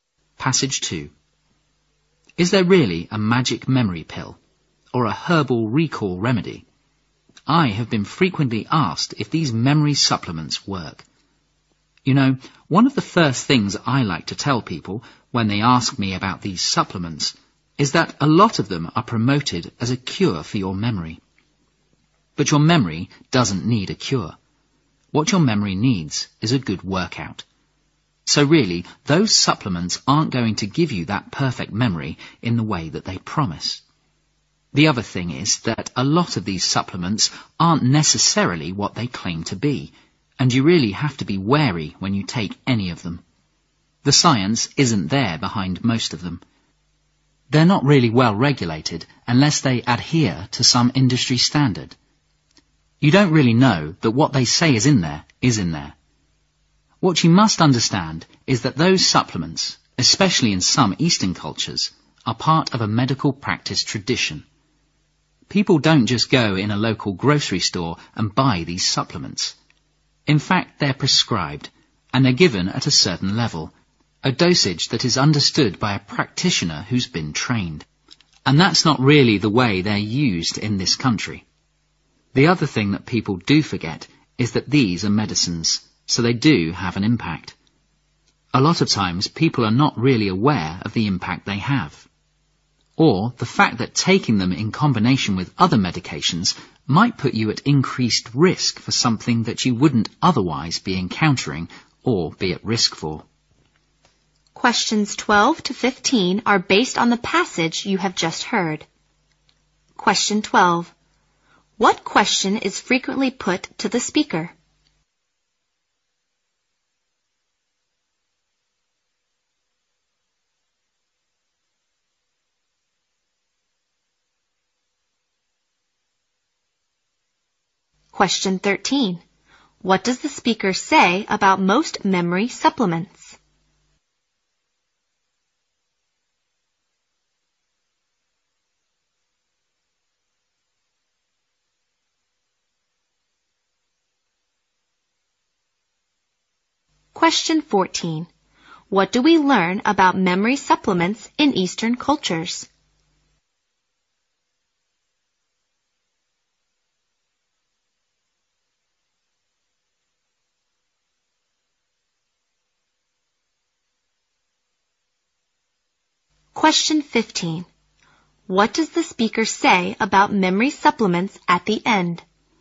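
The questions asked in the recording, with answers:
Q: What question is frequently put to the speaker?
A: Whether memory supplements work

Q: What does the speaker say about most memory supplements?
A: They lack scientific support and are not well regulated

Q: What do we learn about memory supplements in Eastern cultures?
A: They are prescribed by trained practitioners at certain dosages as part of medical tradition

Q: What does the speaker say about memory supplements at the end?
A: They are medicines with effects and may be risky combined with other medications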